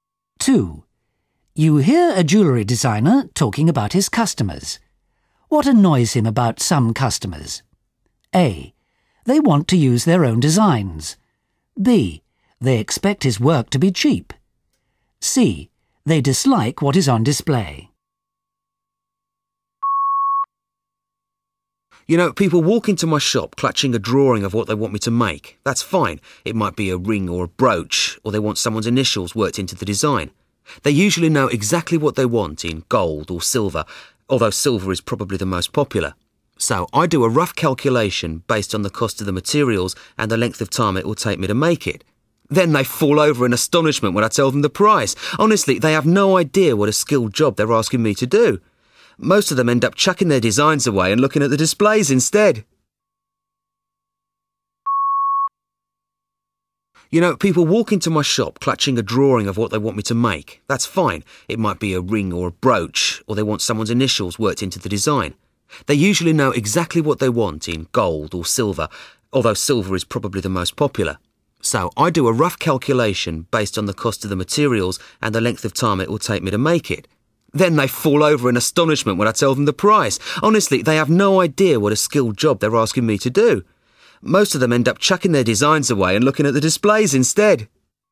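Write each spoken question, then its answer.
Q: What annoys him about some customers?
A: B: They expect his work to be cheap.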